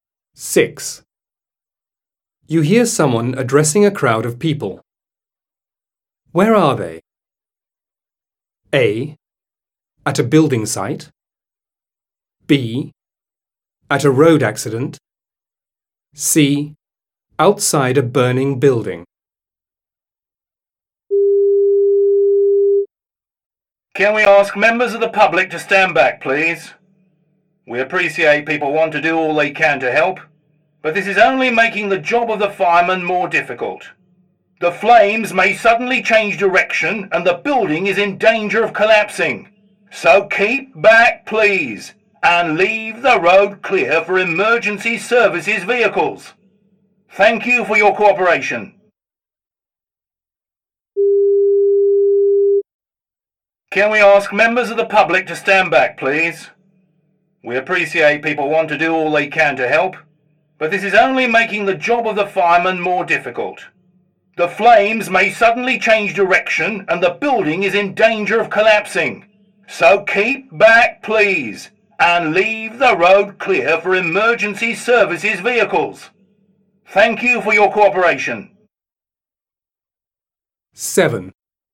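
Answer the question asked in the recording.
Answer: C: Outside a burning building.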